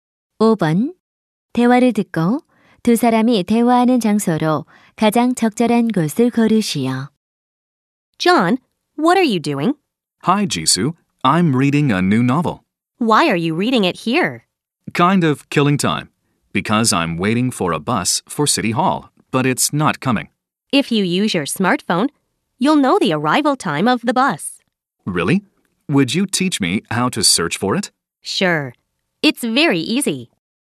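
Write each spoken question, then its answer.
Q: 대화를 듣고 두 사람이 대화하는 장소로 가장 적절한 곳을 고르시오.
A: 버스 정류장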